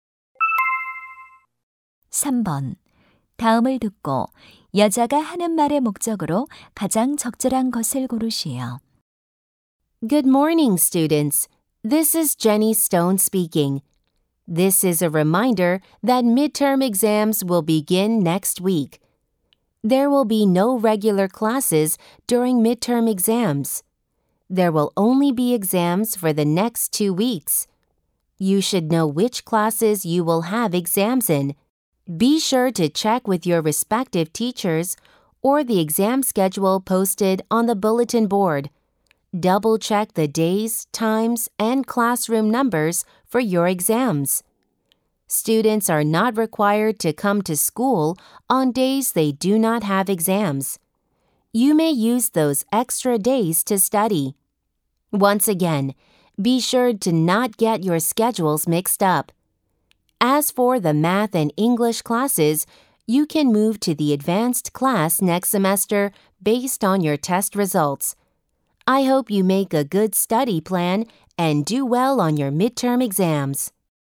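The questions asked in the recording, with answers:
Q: 다음을 듣고 여자가 하는 말의 목적으로 가장 적절한 것을 고르시오.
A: 중간고사 일정을 확인하도록 상기시키려고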